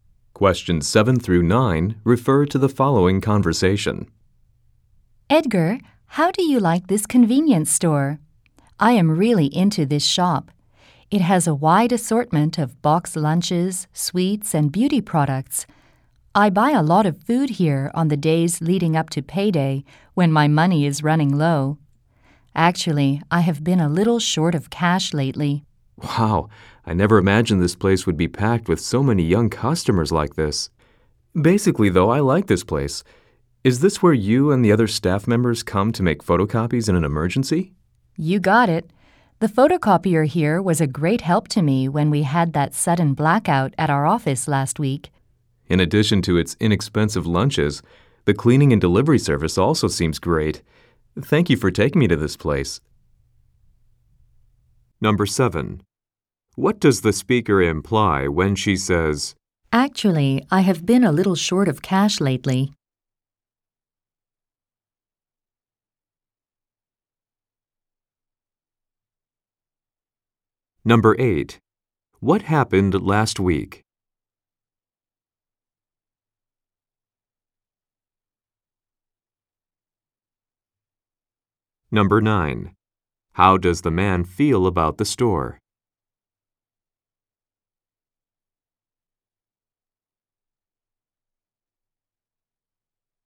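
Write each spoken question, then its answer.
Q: What happened last week?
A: There was a sudden blackout at their office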